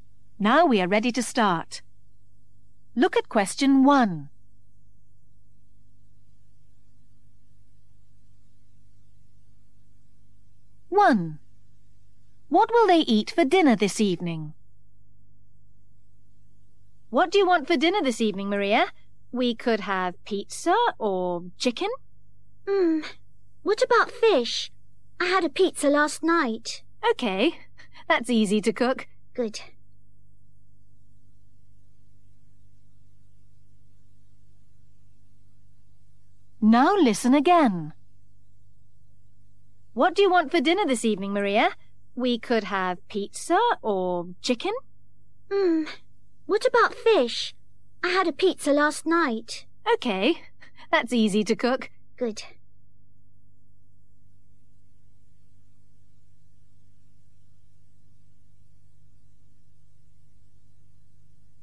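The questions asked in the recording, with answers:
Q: What will they eat for dinner this evening?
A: Fish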